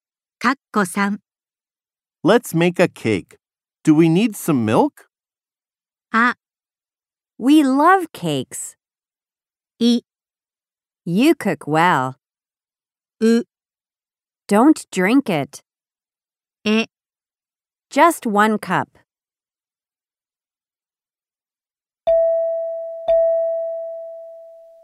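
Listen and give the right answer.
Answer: え: Just one cup.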